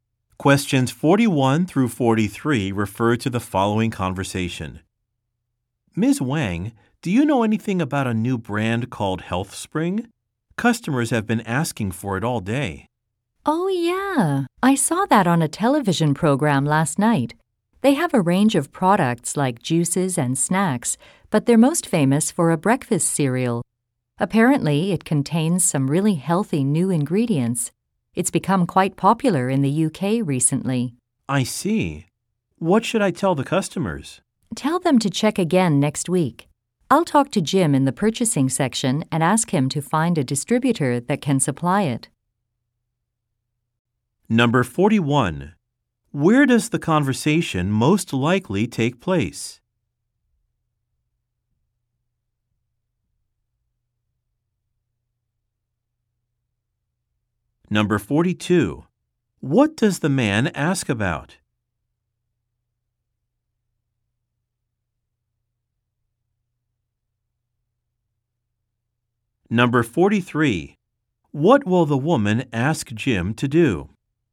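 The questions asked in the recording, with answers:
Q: What does the man ask about?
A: A new brand called HealthSpring

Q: What will the woman ask Jim to do?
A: Find a distributor that can supply it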